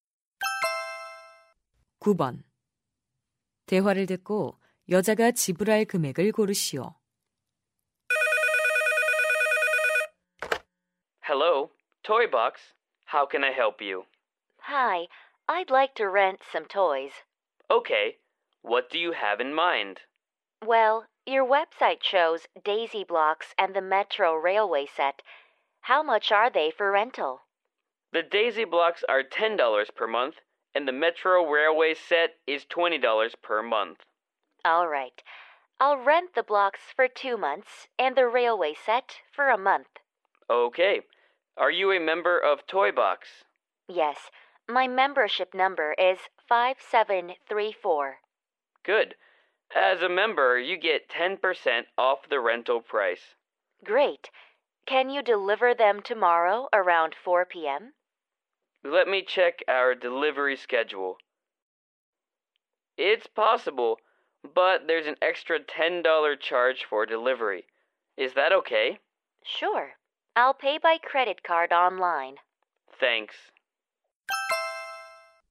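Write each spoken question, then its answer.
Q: 대화를 듣고 여자가 지불할 금액을 고르시오.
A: $46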